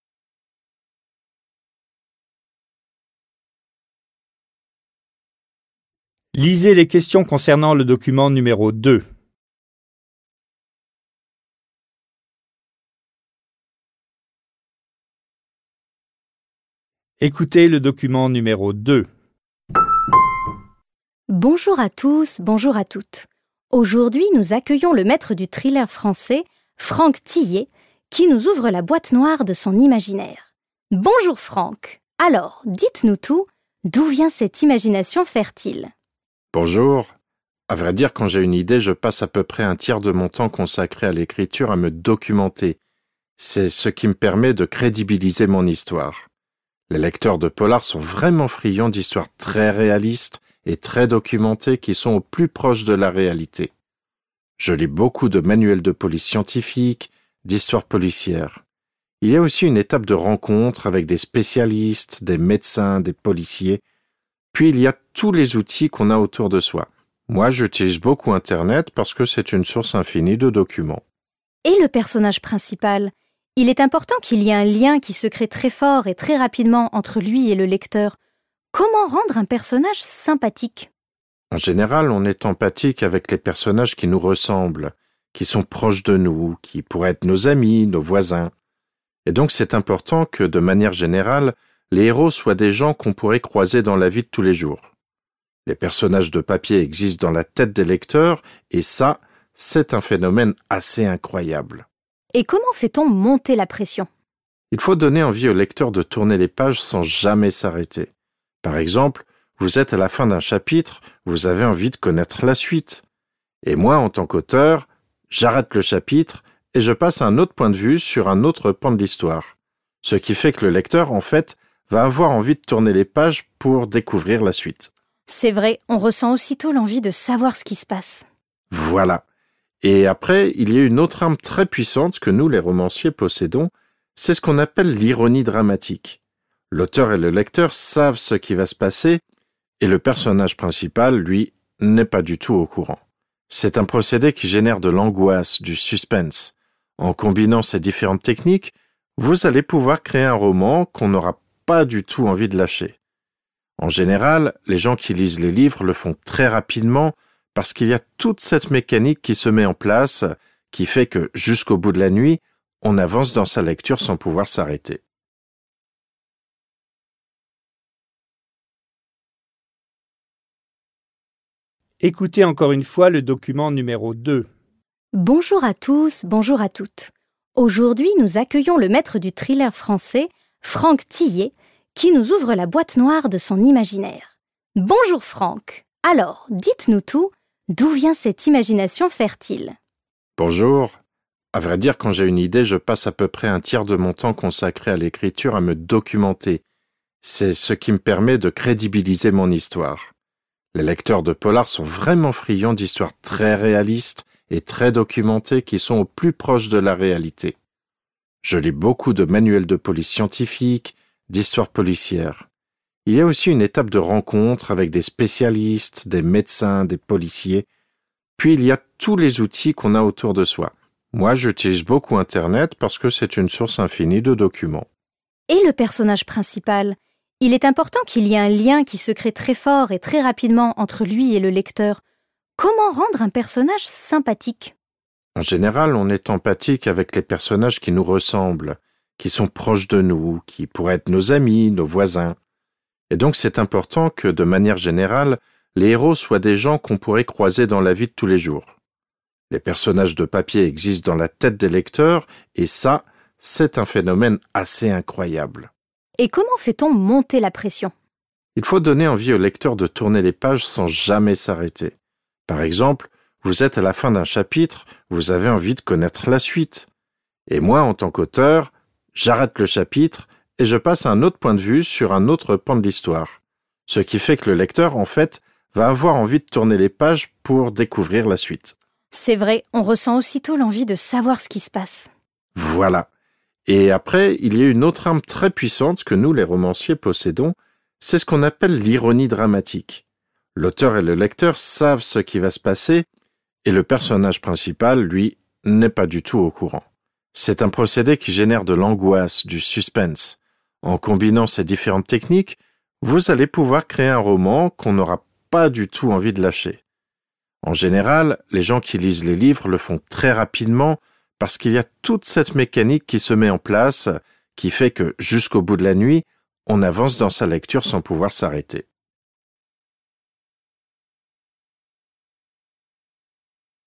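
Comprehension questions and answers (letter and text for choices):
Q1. Franck Thilliez s'appuie sur des documents pour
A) rendre sa tâche la plus facile possible.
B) choisir des personnages authentiques.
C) rédiger un manuel de police scientifique.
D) créer un roman aussi vraisemblable que possible.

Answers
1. D) créer un roman aussi vraisemblable que possible.

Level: dwujęzyczny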